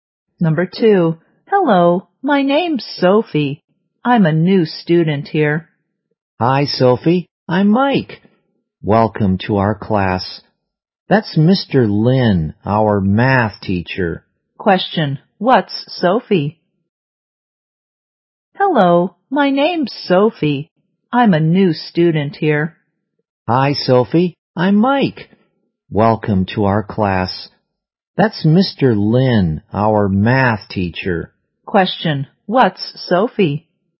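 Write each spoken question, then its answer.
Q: what's Sophie?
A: A new student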